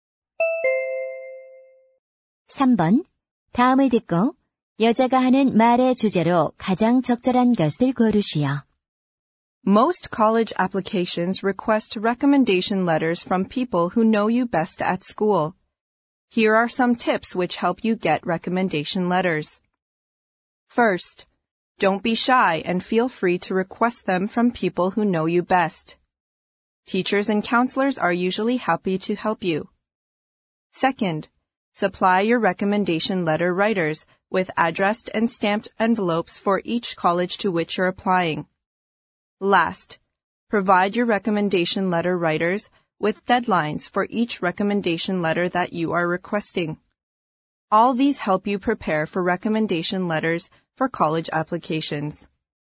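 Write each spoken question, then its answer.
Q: 다음을 듣고 여자가 하는 말의 주제로 가장 적절한 것을 고르시오.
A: 대학 지원용 추천서를 받는 요령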